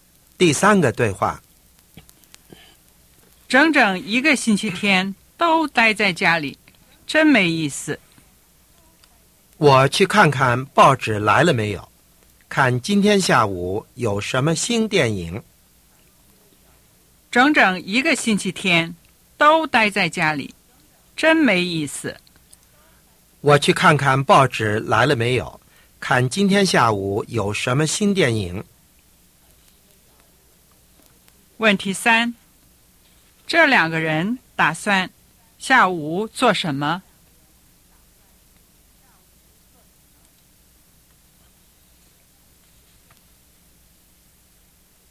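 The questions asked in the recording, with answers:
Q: 这两个人打算下午做什么?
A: 看电影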